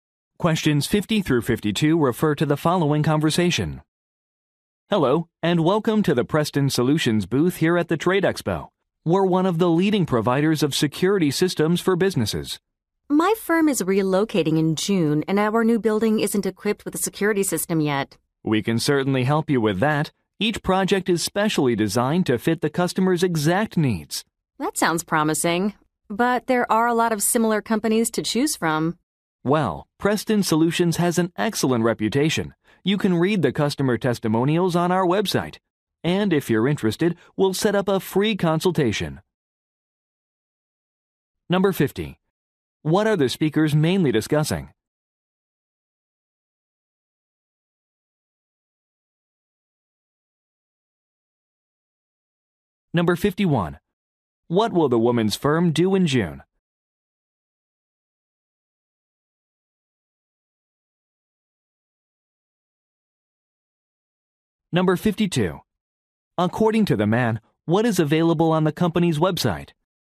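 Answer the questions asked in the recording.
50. A security system
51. Relocate
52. Customer testimonials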